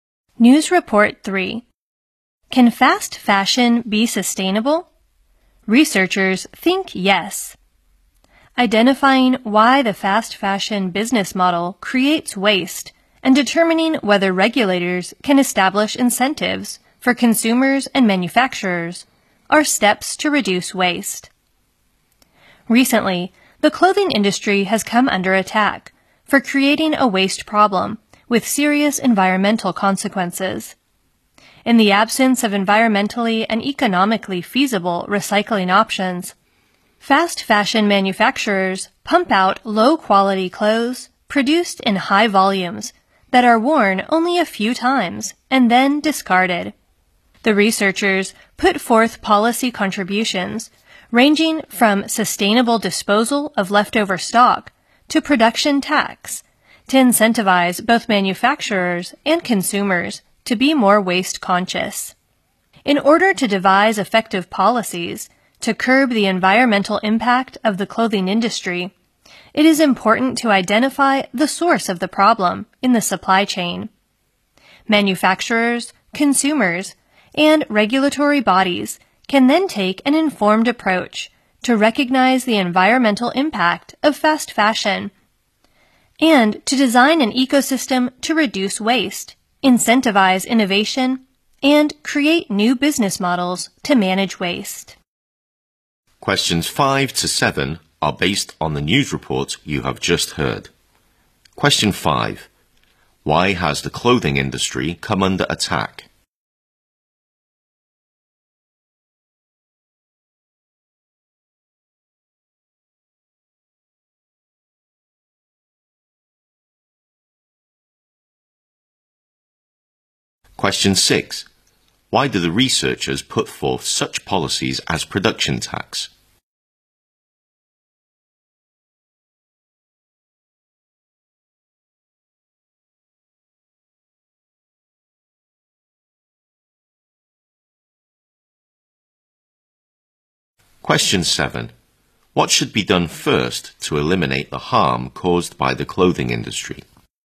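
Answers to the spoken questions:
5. Its waste problem has serious effects on the environment.
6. To get manufacturers and consumers to be more careful about waste
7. Find where the problem starts in the supply chain.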